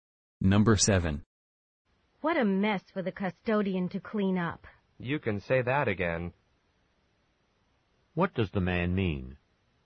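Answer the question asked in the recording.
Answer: He agrees that it is a big mess.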